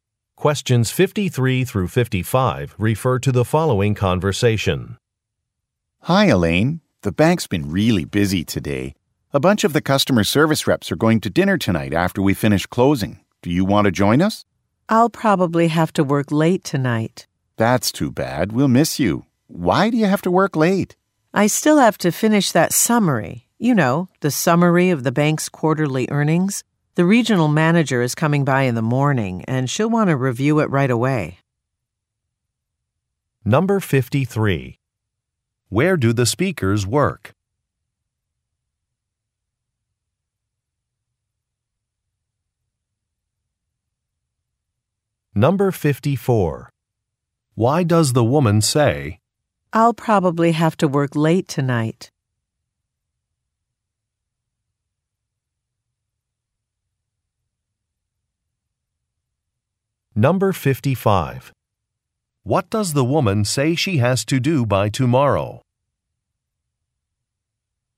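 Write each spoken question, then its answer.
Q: Where do the speakers work?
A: At a bank

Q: What does the woman say she has to do by tomorrow?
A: Finish a quarterly earnings summary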